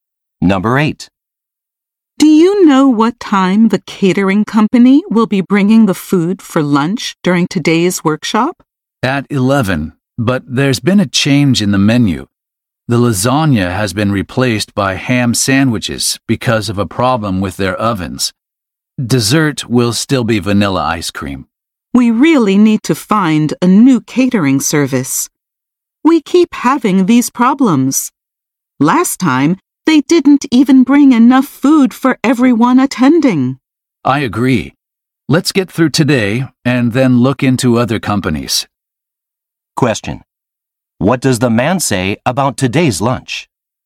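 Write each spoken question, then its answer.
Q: What does the man say about today's lunch?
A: The lasagna has been replaced by ham sandwiches.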